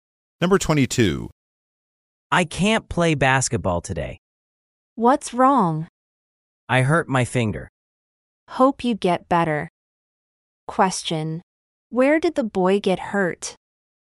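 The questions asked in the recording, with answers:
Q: Where did the boy get hurt?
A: His finger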